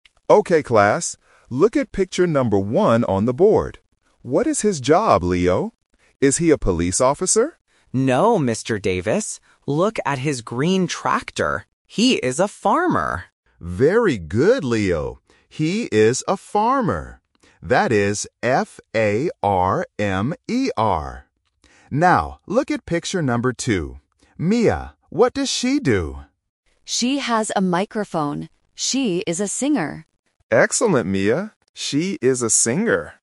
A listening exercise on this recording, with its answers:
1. What is the man's job in picture number one?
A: A farmer

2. How do you spell the job in picture number one?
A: F-A-R-M-E-R

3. What is the woman's job in picture number two?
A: A singer

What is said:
Mr. Davis: Okay class, look at picture number one on the board. What is his job, Leo? Is he a police officer?
Leo: No, Mr. Davis. Look at his green tractor. He is a farmer.
Mr. Davis: Very good, Leo. He is a farmer. That is F-A-R-M-E-R. Mia, what does she do?
Mia: She has a microphone. She is a singer.
Mr. Davis: Excellent, Mia. She is a singer.

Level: A1